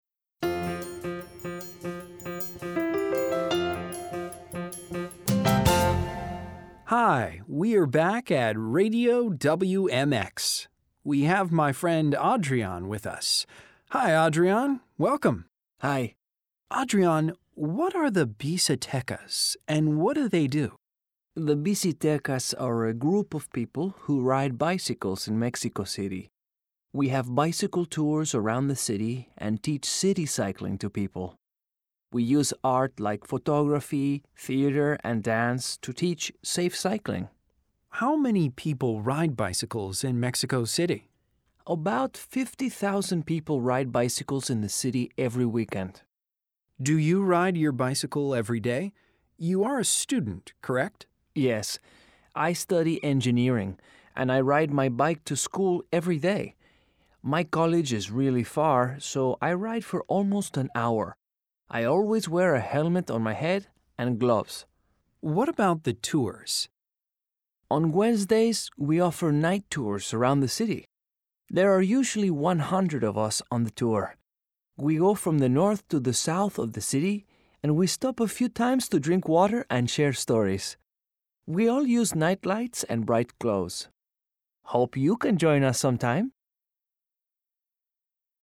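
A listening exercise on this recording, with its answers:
LISTEN FOR DETAIL Listen to the interview again and answer the questions.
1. What is the name of Adrian's group?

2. Where is his group from?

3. How many people ride bicycles in Mexico City on the weekend?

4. When are the night tours?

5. How many people usually take the tours?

Read the sentences and write T if True or F if False. Write the correct answers.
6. Adrian's group has bicycle tours to teach people about art.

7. Adrian rides his bicycle to his job at the theater every day.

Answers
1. Bicitekas
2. Mexico City
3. About 50,000
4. On Wednesdays
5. 100
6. F (they use art to teach safe cycling)
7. F (he rides to school/college)

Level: A2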